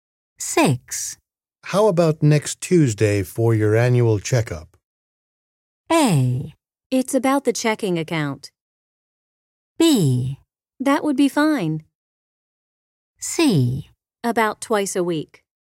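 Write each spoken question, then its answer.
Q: How about next Tuesday for your annual checkup?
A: B: That would be fine.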